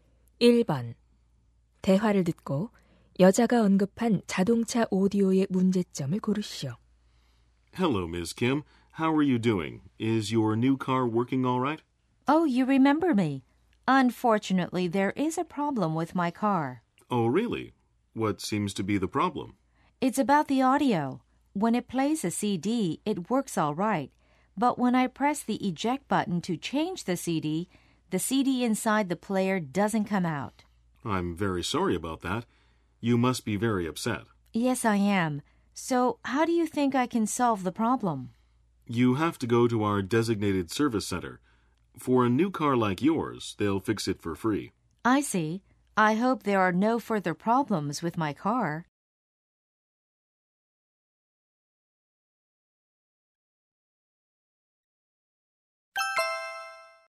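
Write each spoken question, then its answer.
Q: 1번 대화를 듣고 여자가 언급한 자동차 오디오의 문제점을 고르시오.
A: 꺼내기 버튼을 눌러도 CD가 나오지 않는다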